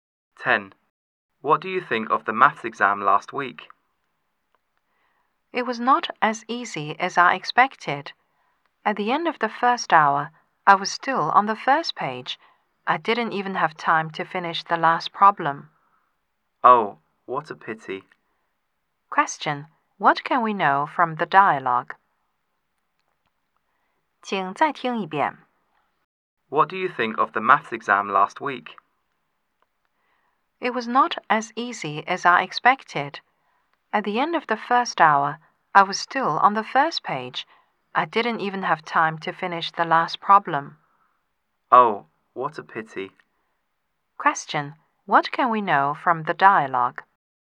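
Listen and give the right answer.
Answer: The maths exam was difficult and the speaker didn't finish it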